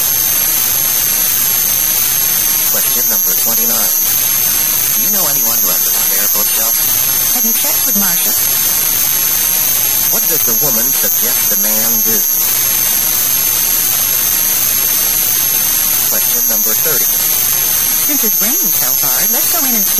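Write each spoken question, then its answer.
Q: What does the woman suggest the man do?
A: Ask Marcia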